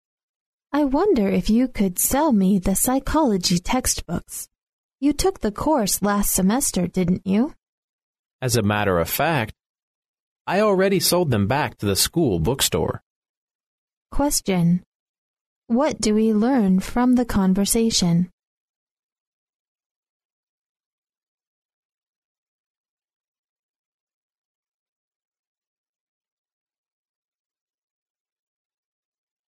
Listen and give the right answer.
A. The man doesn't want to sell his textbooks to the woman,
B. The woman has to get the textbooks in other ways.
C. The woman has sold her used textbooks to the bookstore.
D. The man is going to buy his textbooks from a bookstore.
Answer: B. The woman has to get the textbooks in other ways.

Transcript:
[听力原文] W: I wonder if you could sell me the Psychology textbooks. You took the course last semester, didn't you? M: As a matter of fact, I already sold them back to the school bookstore. Q: What do we learn from the conversation?